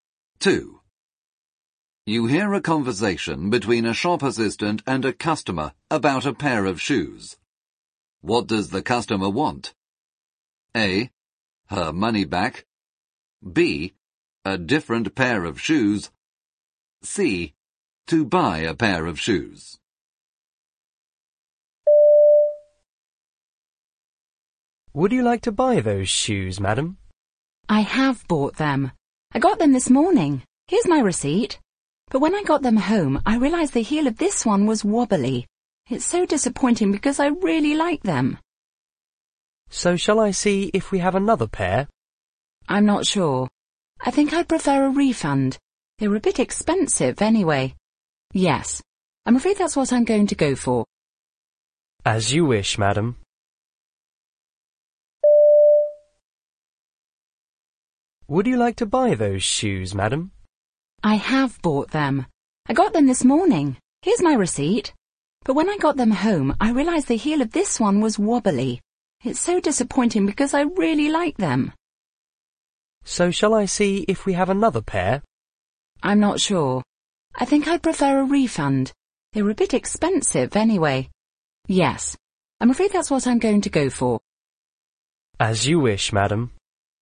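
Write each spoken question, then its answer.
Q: What does the customer want?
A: A: Her money back.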